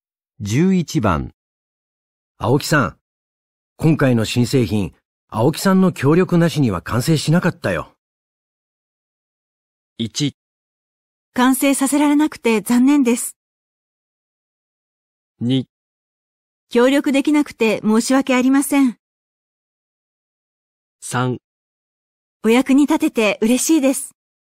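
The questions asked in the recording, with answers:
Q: 青木さん、今回の新製品、青木さんの協力なしには完成しなかったよ。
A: 3: お役に立てて嬉しいです。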